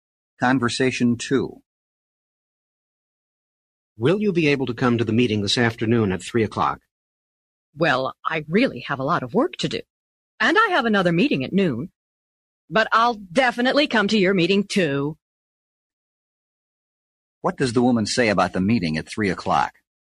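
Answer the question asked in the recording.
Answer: She will definitely come.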